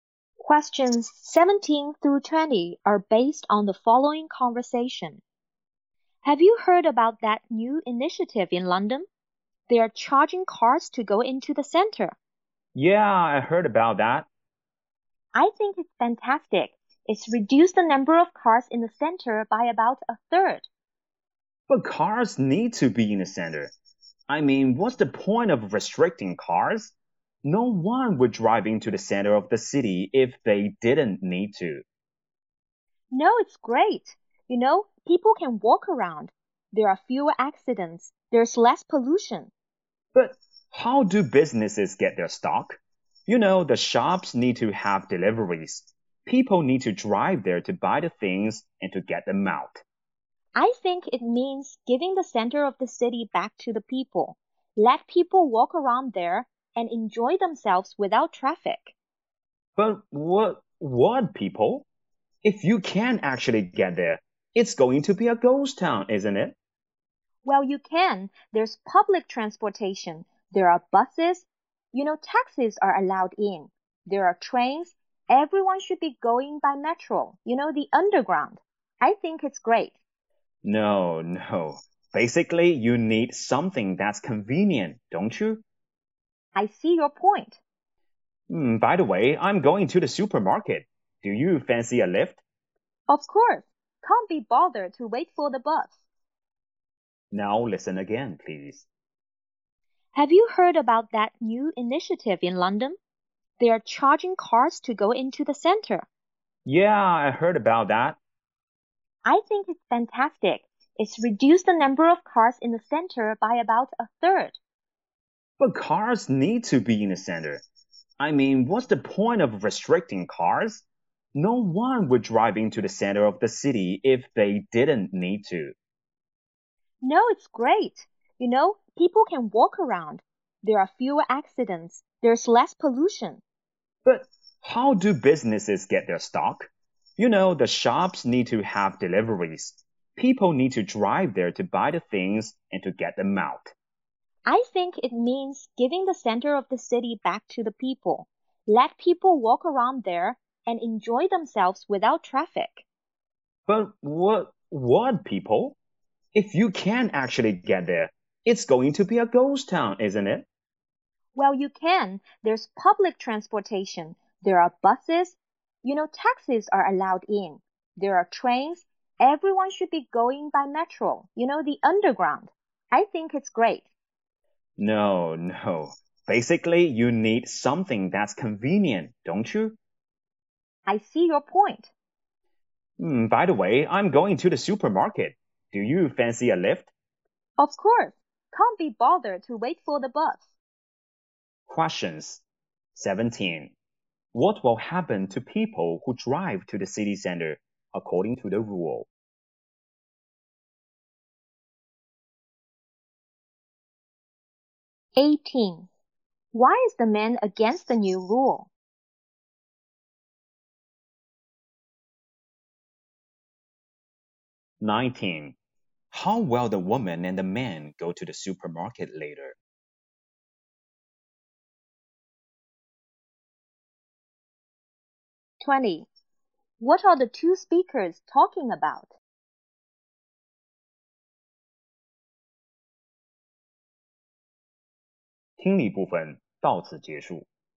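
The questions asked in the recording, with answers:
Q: What will happen to people who drive to the city center according to the rule?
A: They will be charged

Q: How will the woman and the man go to the supermarket later?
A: By car

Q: What are the two speakers talking about?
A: London's charge on cars entering the city center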